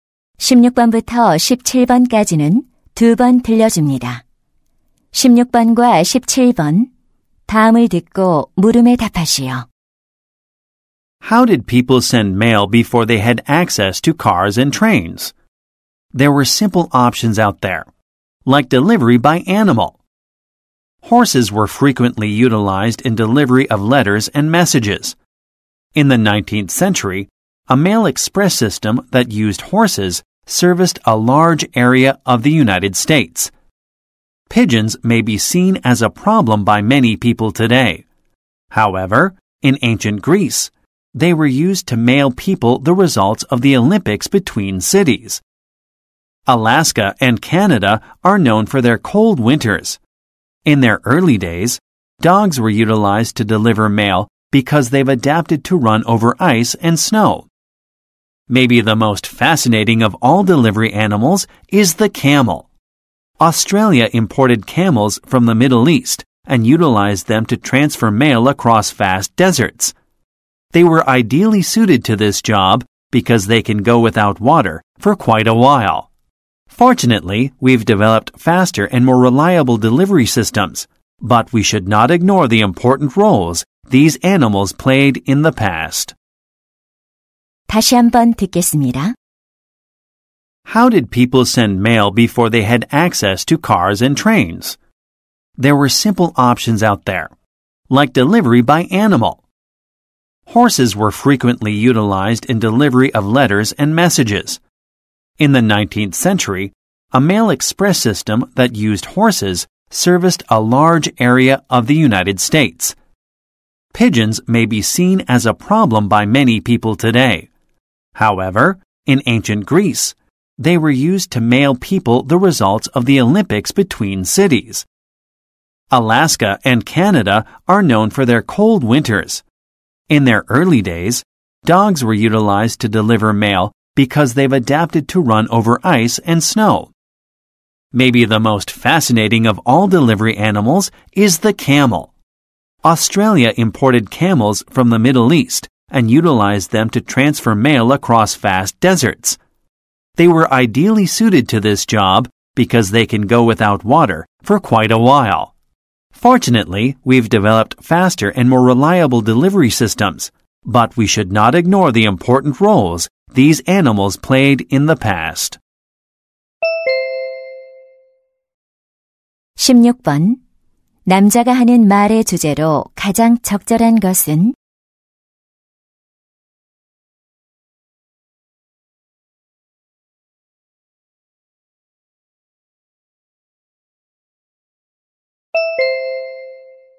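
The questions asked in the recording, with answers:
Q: 남자가 하는 말의 주제로 가장 적절한 것은?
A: 과거에 우편 배달에 이용된 동물들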